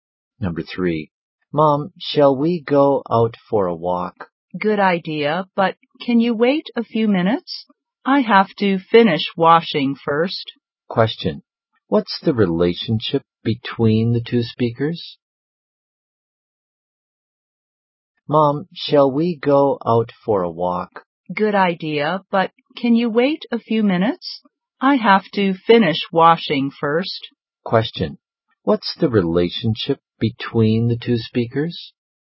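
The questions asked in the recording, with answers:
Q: What's the relationship between the two speakers?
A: Mother and child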